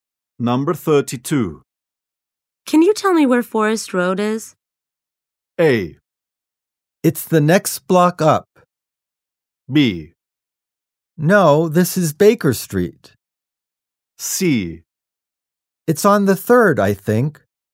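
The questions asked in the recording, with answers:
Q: Can you tell me where Forest Road is?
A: A: It's the next block up.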